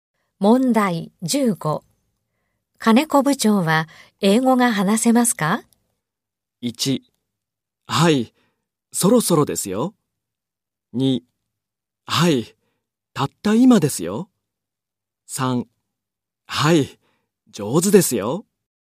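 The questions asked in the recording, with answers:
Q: 金子部長は英語が話せますか?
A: 3: はい、上手ですよ。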